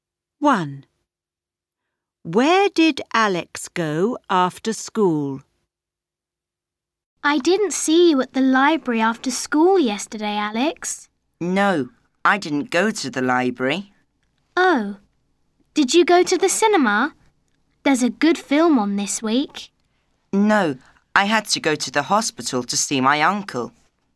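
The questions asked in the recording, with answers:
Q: Where did Alex go after school?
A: to the hospital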